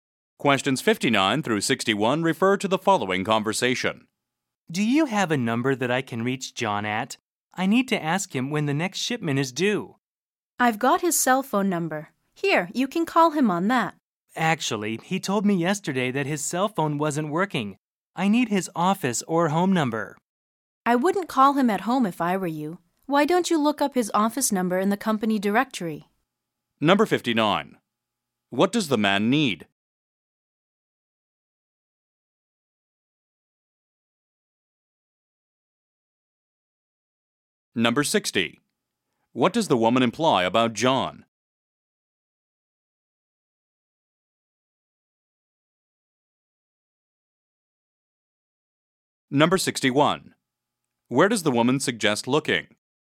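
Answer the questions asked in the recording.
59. A phone number for John
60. He wouldn't like being called at home
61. In the company directory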